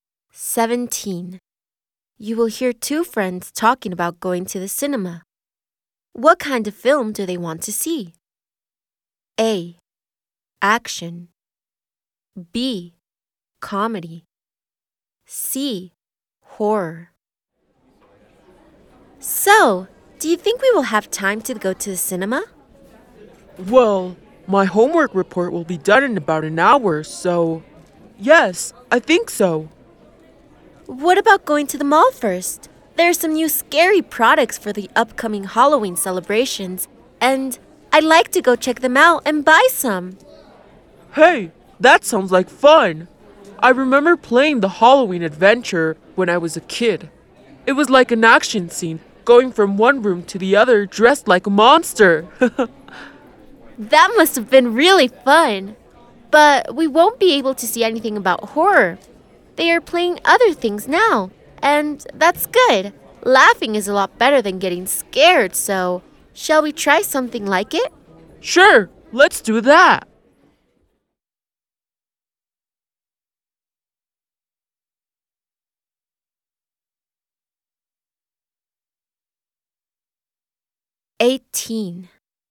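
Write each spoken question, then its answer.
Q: What kind of film do they want to see?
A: B: Comedy.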